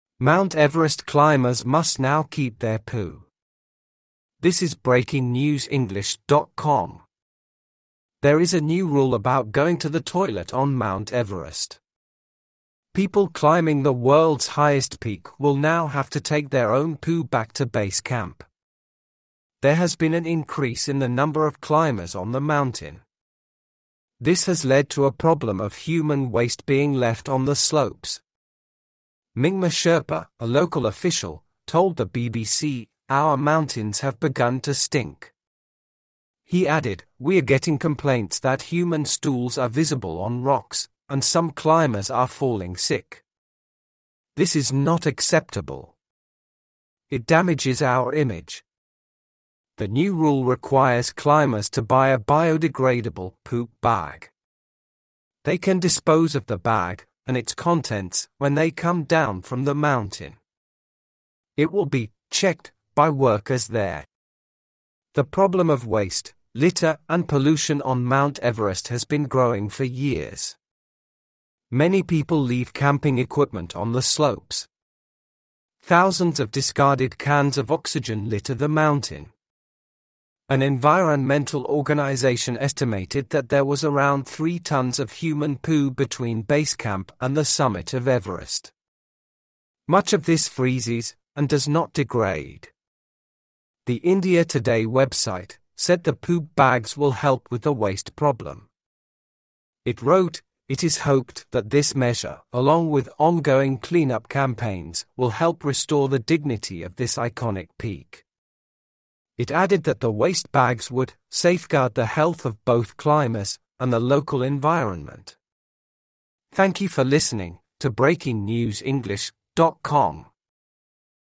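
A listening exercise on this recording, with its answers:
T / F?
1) There are new toilets at Base Camp on Mount Everest.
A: F

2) The number of people climbing Everest has fallen.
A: F

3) A local official said the mountains are starting to smell really bad.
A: T

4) Climbers have to put their poop in a special bio-degradable bag.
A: T

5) Climbers have left thousands of oxygen cans on Mount Everest.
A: T

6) An environmental group said there are about 3 tons of poo on Everest.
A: T

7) Most of the poo washes into the rocks when it rains.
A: F

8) A website said the poo bags would have little effect on the environment.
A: F

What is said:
Mt Everest climbers must now keep their poo
There is a new rule about going to the toilet on Mount Everest. People climbing the world's highest peak will now have to take their own poo back to Base Camp. There has been an increase in the number of climbers on the mountain. 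This has led to a problem of human waste being left on the slopes. Mingma Sherpa, a local official, told the BBC: "Our mountains have begun to stink." He added: "We are getting complaints that human stools are visible on rocks, and some climbers are falling sick. This is not acceptable. It damages our image." The new rule requires climbers to buy a bio-degradable "poop bag". They can dispose of the bag and its contents when they come down from the mountain. It will be "checked" by workers there.
The problem of waste, litter and pollution on Mt Everest has been growing for years. Many people leave camping equipment on the slopes. Thousands of discarded cans of oxygen litter the mountain. An environmental organization estimated that there was around three tons of human poo between Base Camp and the summit of Everest. Much of this freezes and does not degrade. The India Today website said the poop bags will help with the waste problem. 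It wrote: "It is hoped that this measure, along with ongoing clean-up campaigns, will help restore the dignity of this iconic peak." It added that the waste bags would, "safeguard the health of both climbers and the local environment".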